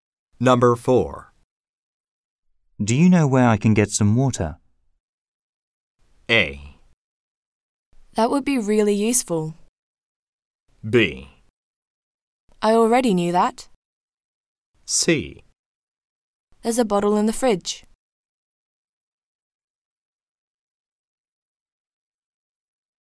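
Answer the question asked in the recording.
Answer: C: There's a bottle in the fridge.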